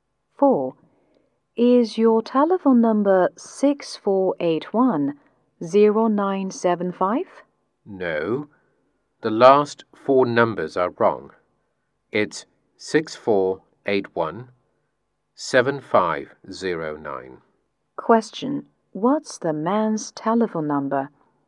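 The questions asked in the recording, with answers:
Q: Question: What's the man's telephone number?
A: 6481-7509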